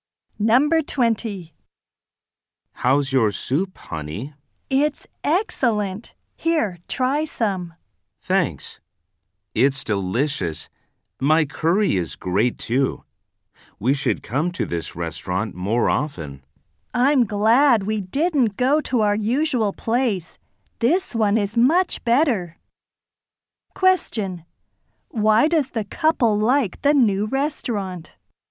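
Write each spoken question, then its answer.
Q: Why does the couple like the new restaurant?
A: The food is delicious.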